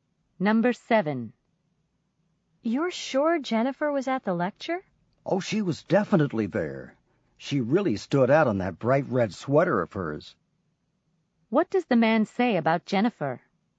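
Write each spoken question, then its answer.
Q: What does the man say about Jennifer?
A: She was easy to notice in her bright red sweater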